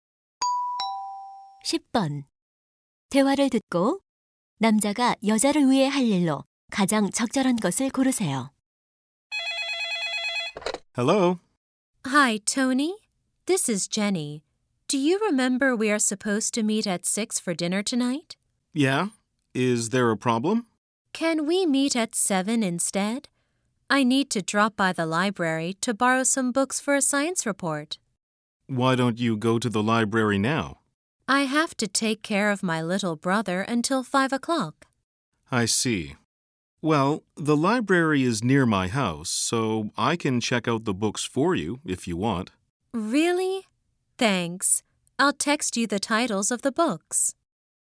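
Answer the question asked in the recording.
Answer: 도서관에서 책 대출해 주기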